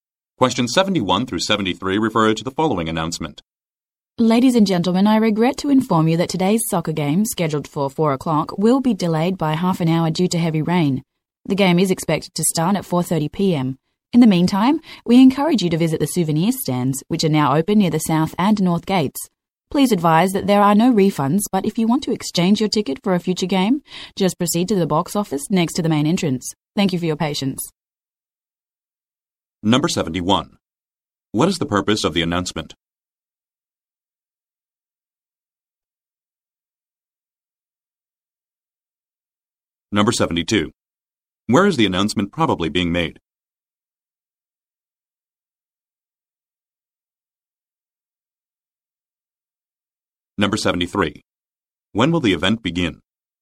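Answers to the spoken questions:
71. To announce a delay of a soccer game due to rain
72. At a soccer stadium
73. At 4:30 p.m.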